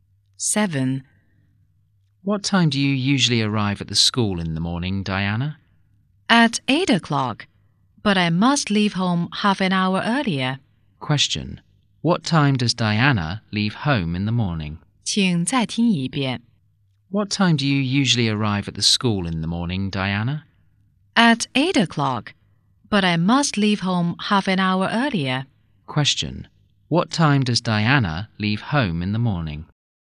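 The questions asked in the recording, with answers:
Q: What time does Diana leave home in the morning?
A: At 7:30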